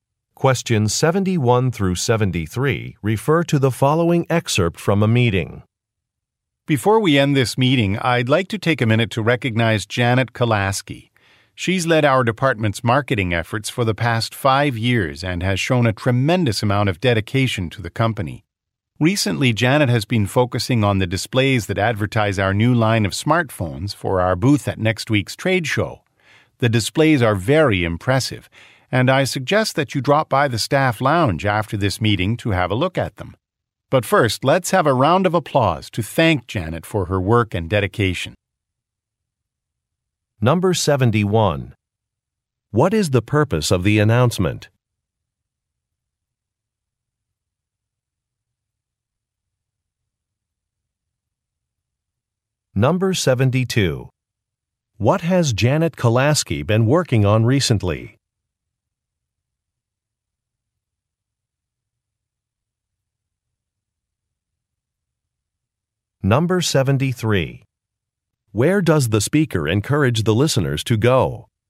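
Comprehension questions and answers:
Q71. What is the purpose of the announcement?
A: To acknowledge a coworker

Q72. What has Janet Kalasky been working on recently?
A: Creating promotional displays

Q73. Where does the speaker encourage the listeners to go?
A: To the employee lounge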